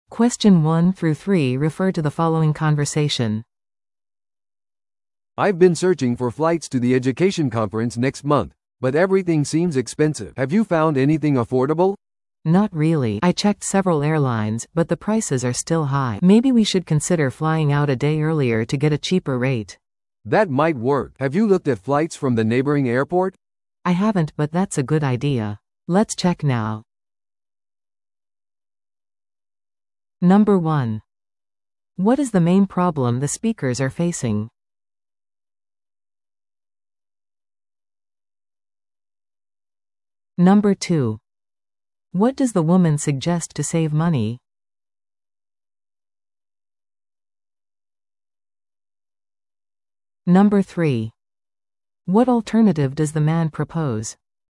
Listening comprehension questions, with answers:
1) What is the main problem the speakers are facing?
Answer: 飛行機のチケットが高すぎる

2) What does the woman suggest to save money?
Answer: 1日早く出発する

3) What alternative does the man propose?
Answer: 別の空港のフライトを調べる

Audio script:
A: "I've been searching for flights to the education conference next month, but everything seems expensive. Have you found anything affordable?"
B: "Not really. I checked several airlines, but the prices are still high. Maybe we should consider flying out a day earlier to get a cheaper rate."
A: "That might work. Have you looked at flights from the neighboring airport?"
B: "I haven't, but that's a good idea. Let's check now."